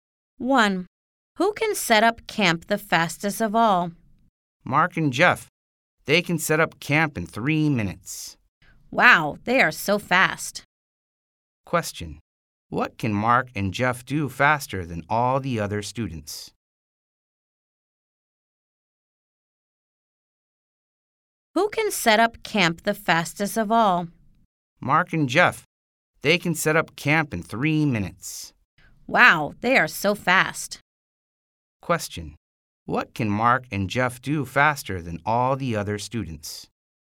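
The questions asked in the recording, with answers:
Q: What can Mark and Jeff do faster than all the other students?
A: Set up camp (in 3 minutes)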